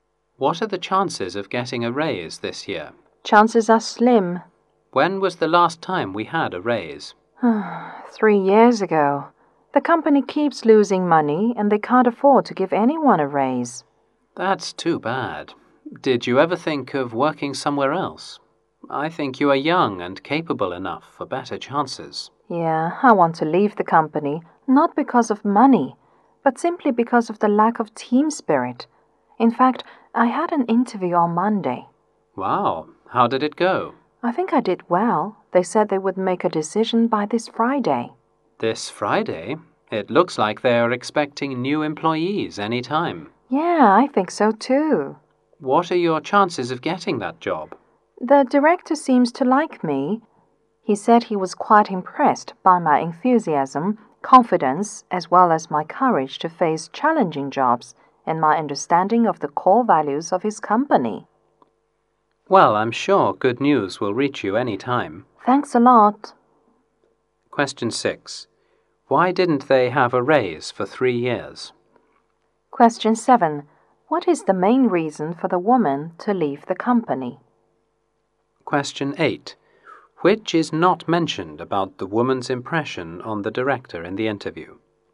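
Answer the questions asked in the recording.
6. The company keeps losing money
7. The lack of team spirit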